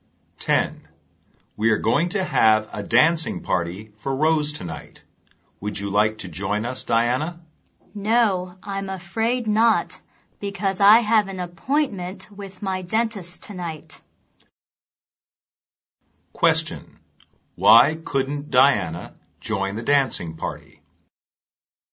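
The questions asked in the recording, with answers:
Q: Why couldn't Diana join the dancing party?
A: She has an appointment with her dentist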